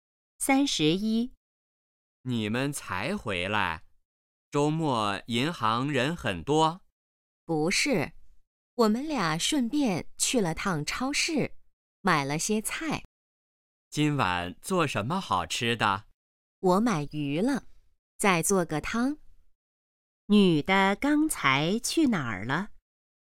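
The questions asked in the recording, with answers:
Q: 女的刚才去哪儿了?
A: 银行和超市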